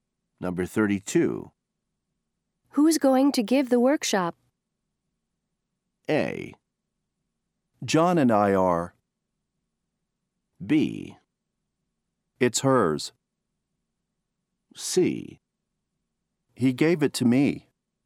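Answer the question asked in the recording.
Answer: A: John and I are.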